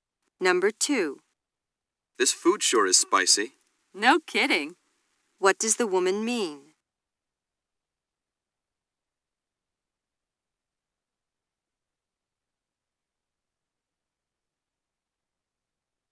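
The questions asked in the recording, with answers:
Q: What does the woman mean?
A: She agrees the food is very spicy.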